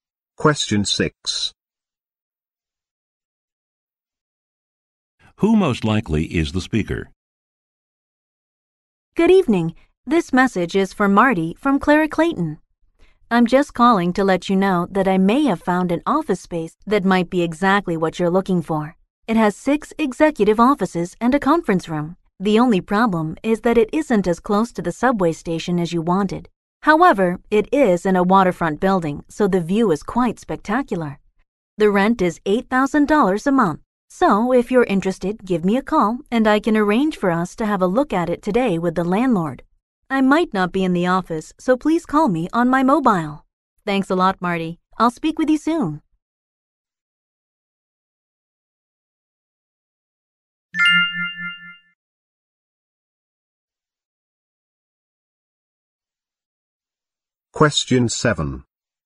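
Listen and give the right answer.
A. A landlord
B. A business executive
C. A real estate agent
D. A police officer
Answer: C. A real estate agent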